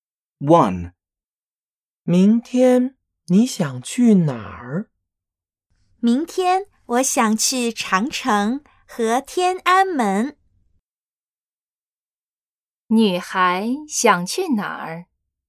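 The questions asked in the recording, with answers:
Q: 女孩想去哪儿?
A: 长城和天安门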